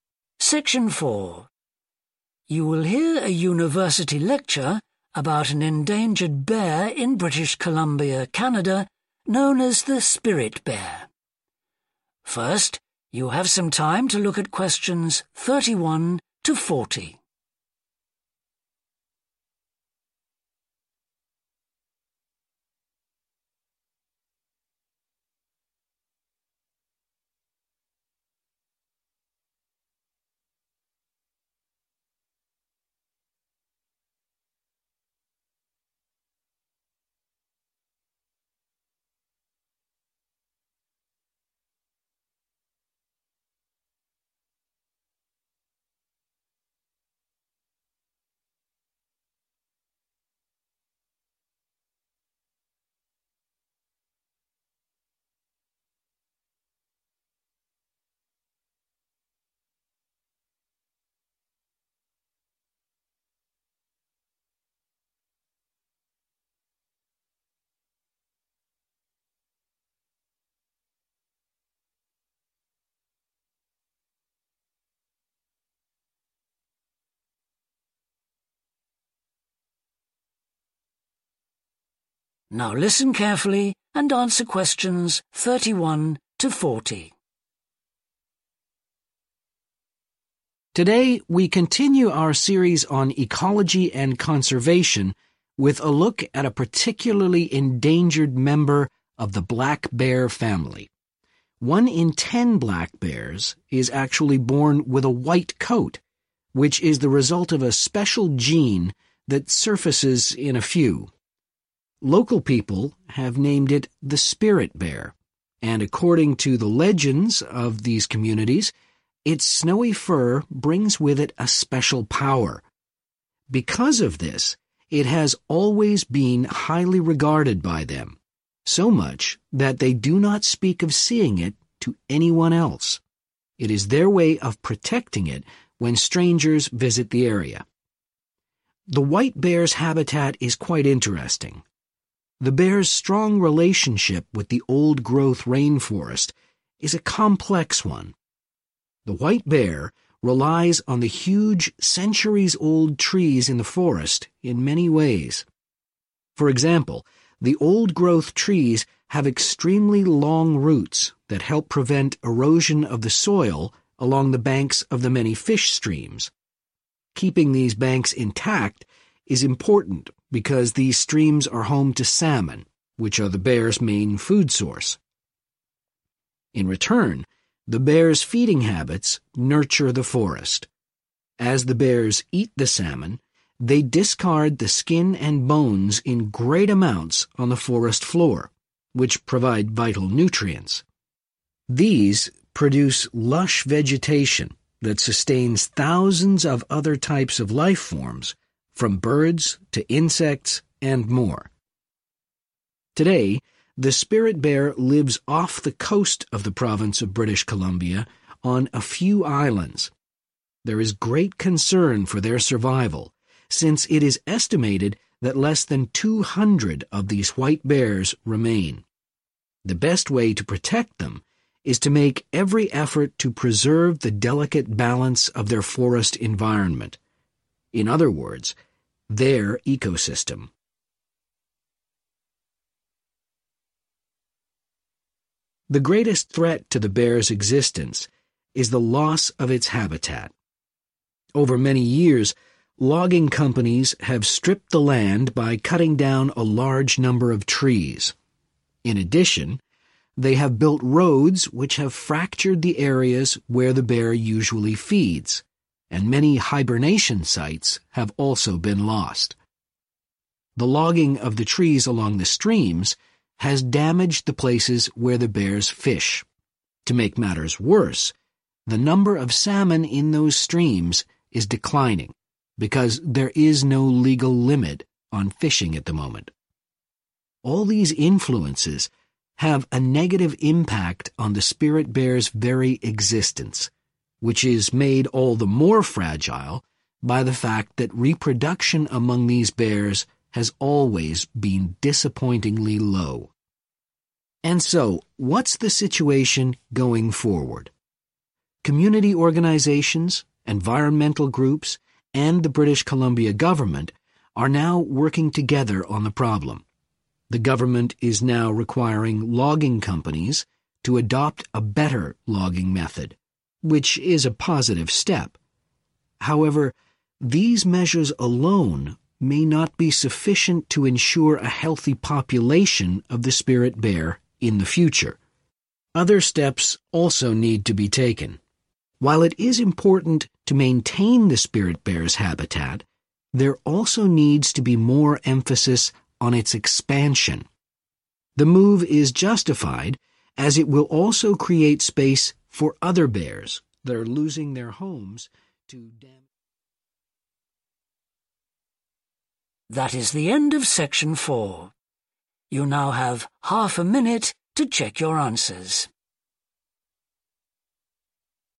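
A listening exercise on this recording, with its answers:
Complete the notes below. Write ONE WORD ONLY for each answer.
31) Its colour comes from an uncommon 31.............. .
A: gene

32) Local people believe that it has unusual 32........... .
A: power

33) They protect the bear from 33............ .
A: strangers

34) Tree roots stop 34............ along salmon streams.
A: erosion

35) It is currently found on a small number of 35........... .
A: islands

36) Habitat is being lost due to deforestation and construction of 36............ by logging companies.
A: roads

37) Unrestricted 37............... is affecting the salmon supply.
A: fishing

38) The bears' existence is also threatened by their low rate of 38............. .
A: reproduction

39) Logging companies must improve their 39................. of logging.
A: method

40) Maintenance and 40................ of the spirit bears' territory is needed.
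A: expansion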